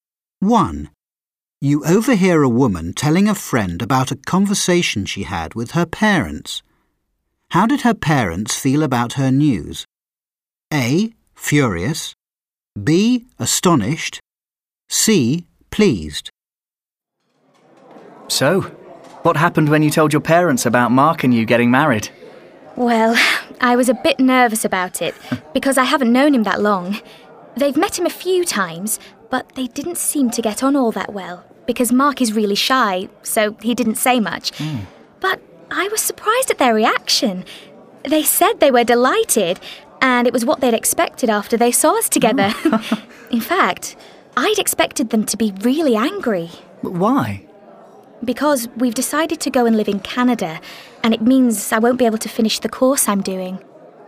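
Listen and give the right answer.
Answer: C: pleased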